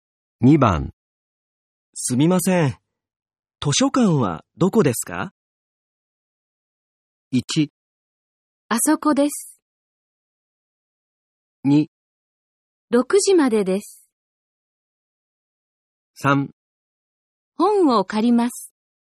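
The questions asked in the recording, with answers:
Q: すみません。図書館はどこですか?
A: 1: あそこです。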